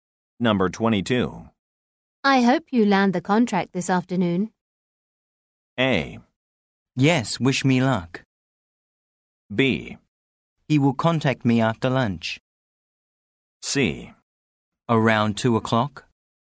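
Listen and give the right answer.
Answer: A: Yes, wish me luck.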